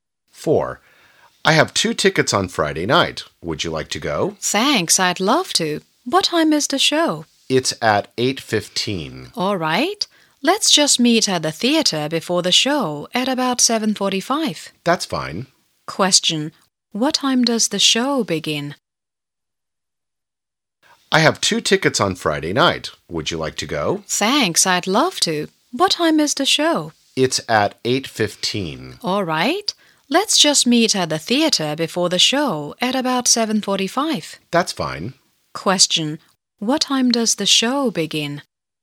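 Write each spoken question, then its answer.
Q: Question. What time does the show begin?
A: At 8:15.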